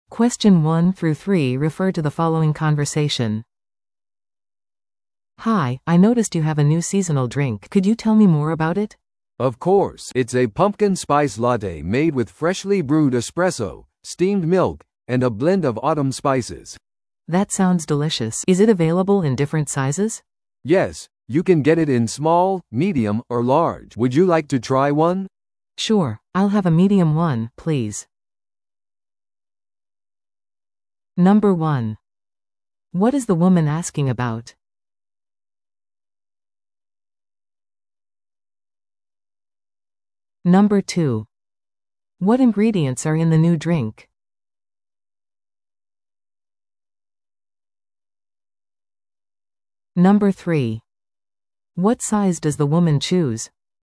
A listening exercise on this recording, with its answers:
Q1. What is the woman asking about?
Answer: 季節限定の新しいドリンク

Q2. What ingredients are in the new drink?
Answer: エスプレッソ、ミルク、スパイス

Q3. What size does the woman choose?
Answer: ミディアム

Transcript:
A: "Hi, I noticed you have a new seasonal drink. Could you tell me more about it?"
B: "Of course! It's a pumpkin spice latte made with freshly brewed espresso, steamed milk, and a blend of autumn spices."
A: "That sounds delicious! Is it available in different sizes?"
B: "Yes, you can get it in small, medium, or large. Would you like to try one?"
A: "Sure! I'll have a medium one, please."